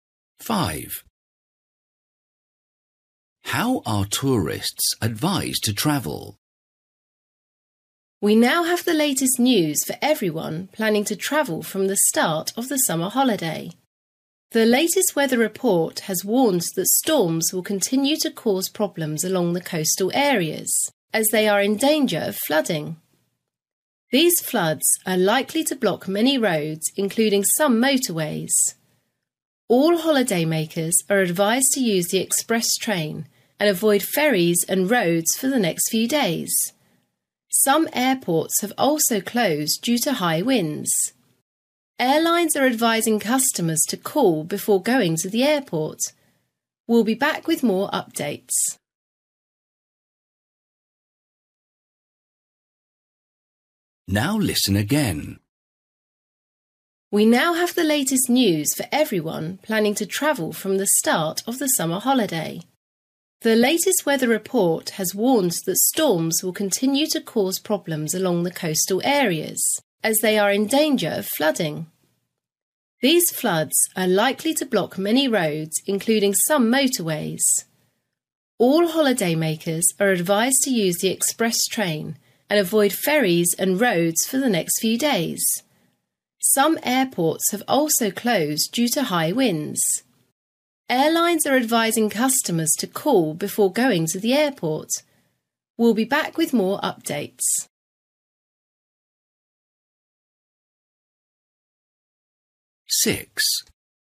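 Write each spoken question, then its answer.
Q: How are tourists advised to travel?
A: By express train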